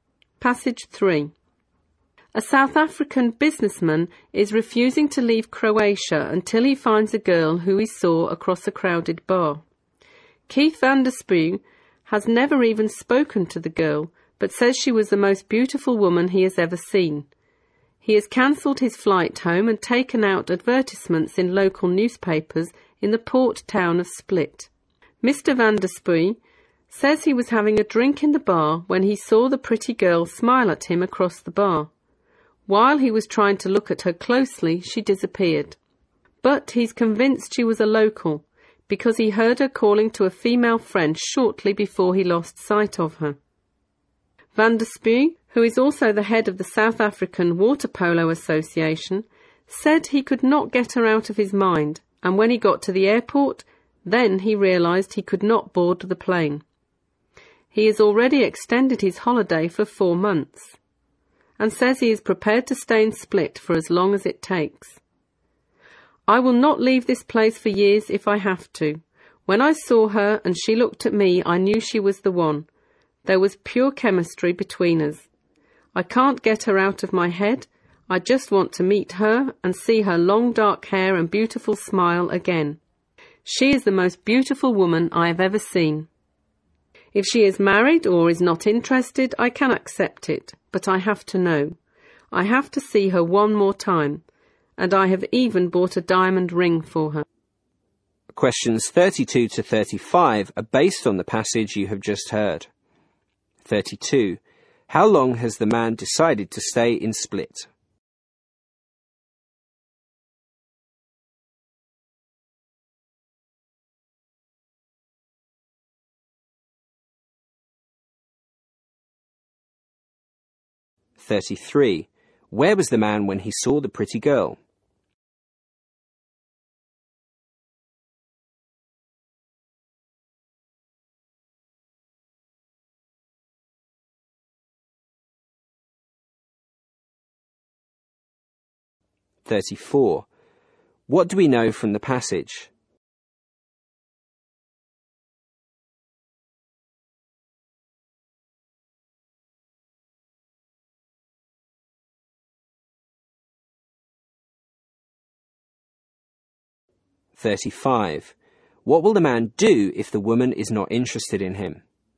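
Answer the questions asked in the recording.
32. As long as it takes
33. In a bar
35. Accept it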